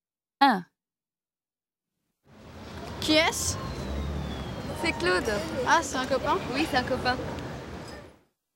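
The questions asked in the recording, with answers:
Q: Qui est-ce?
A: un copain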